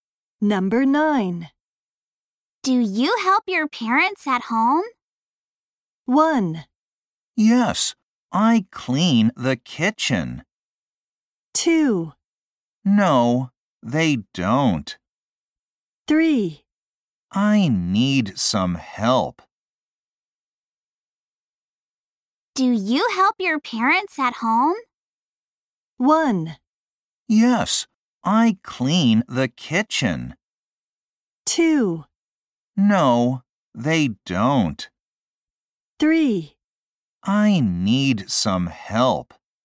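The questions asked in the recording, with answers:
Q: Do you help your parents at home?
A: 1: Yes, I clean the kitchen.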